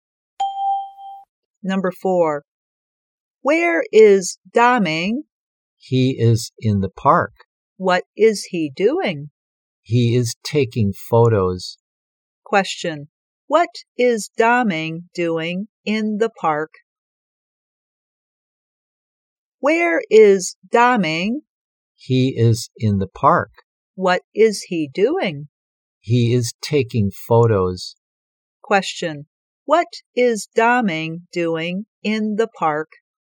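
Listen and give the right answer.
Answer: He is taking photos.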